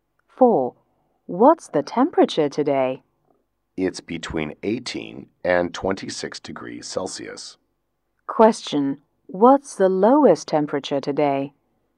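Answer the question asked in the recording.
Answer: 18 degrees Celsius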